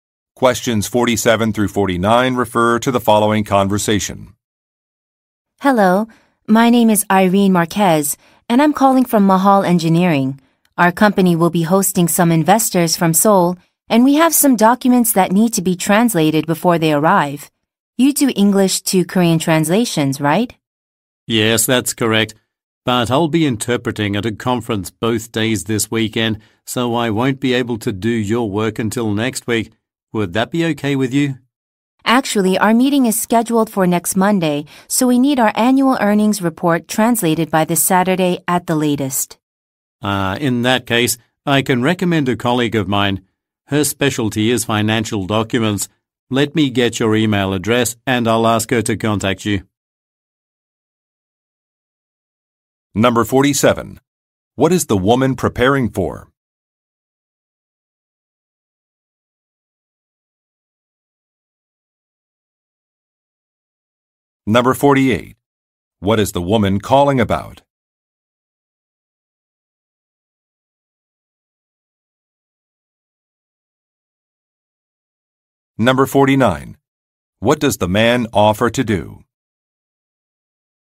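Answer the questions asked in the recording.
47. A visit from investors from Seoul
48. Getting documents translated from English to Korean
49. Recommend a colleague who can do the translation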